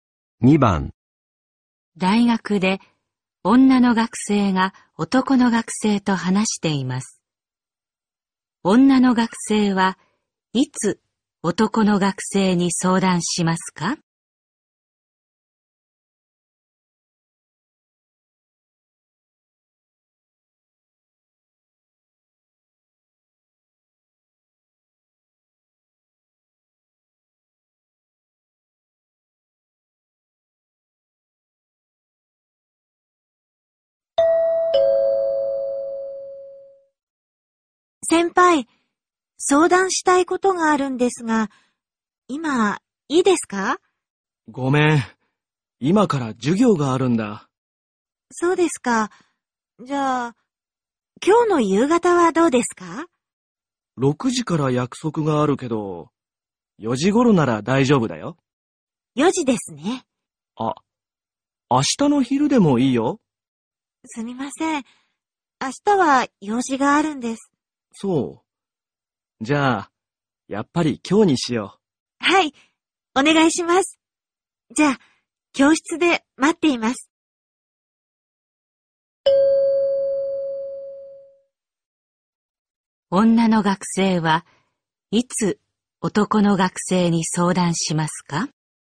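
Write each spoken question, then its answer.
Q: 女の学生はいつ男の学生に相談しますか?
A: 今日の4時頃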